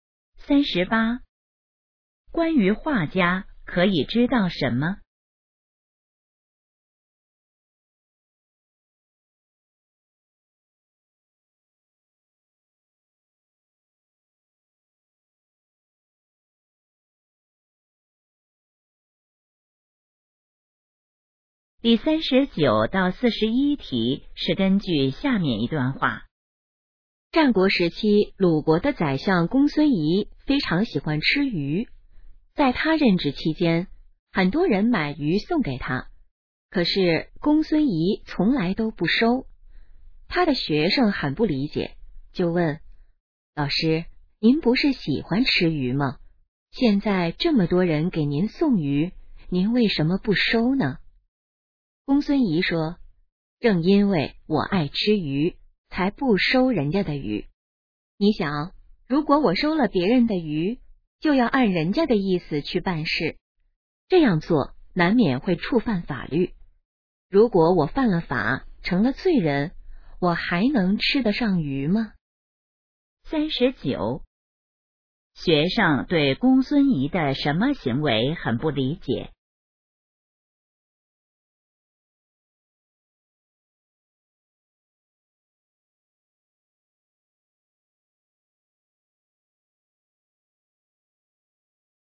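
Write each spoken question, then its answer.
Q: 学生对公孙仪的什么行为很不理解?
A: 喜欢吃鱼却不收别人送的鱼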